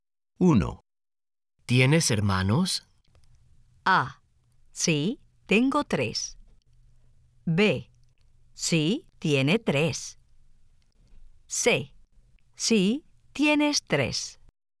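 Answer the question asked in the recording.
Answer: A: Sí, tengo tres.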